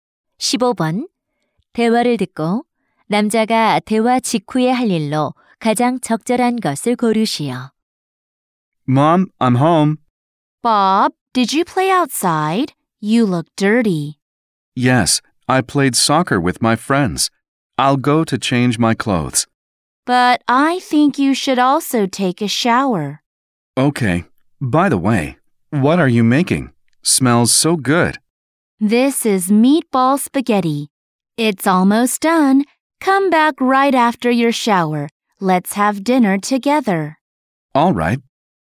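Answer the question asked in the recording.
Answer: 샤워하기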